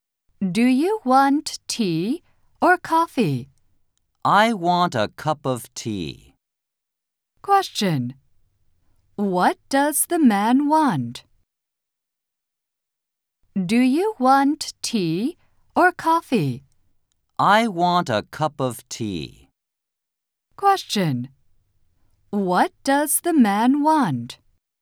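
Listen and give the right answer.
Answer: a cup of tea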